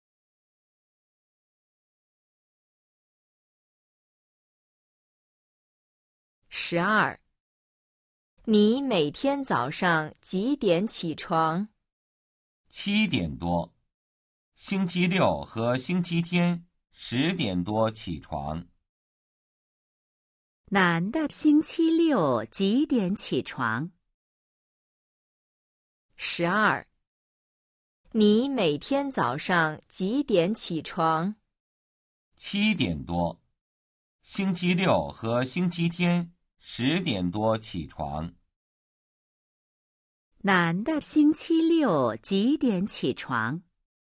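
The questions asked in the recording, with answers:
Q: 男的星期六几点起床?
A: 十点多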